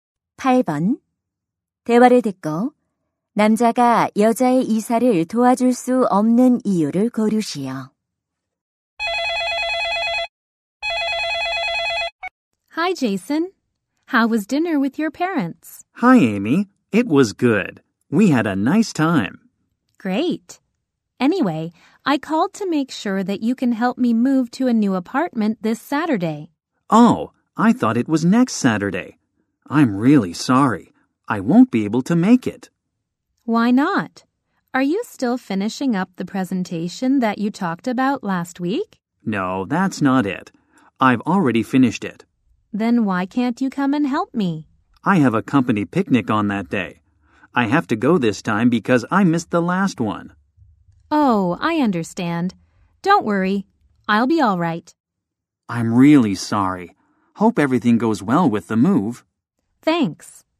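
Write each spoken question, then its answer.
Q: 대화를 듣고 남자가 여자의 이사를 도와줄 수 없는 이유를 고르시오.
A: 회사 야유회에 가야 해서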